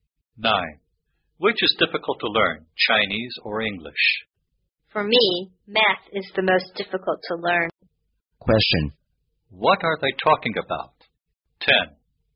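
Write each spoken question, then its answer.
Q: What are they talking about?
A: Which subject is the most difficult to learn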